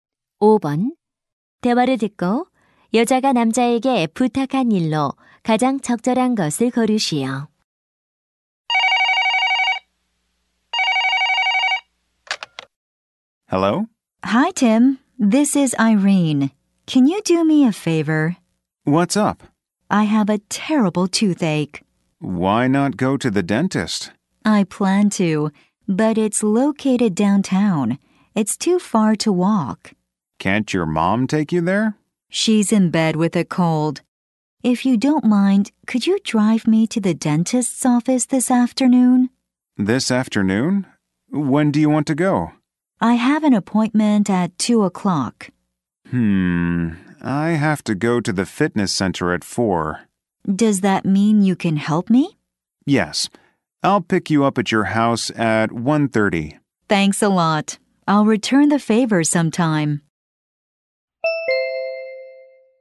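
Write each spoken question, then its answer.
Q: 대화를 듣고 여자가 남자에게 부탁한 일로 가장 적절한 것을 고르시오.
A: 치과에 차로 데려다 주기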